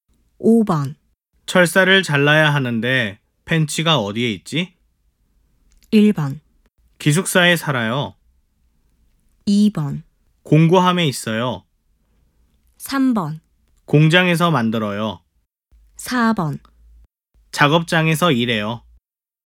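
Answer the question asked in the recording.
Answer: 2: 공구함에 있어요.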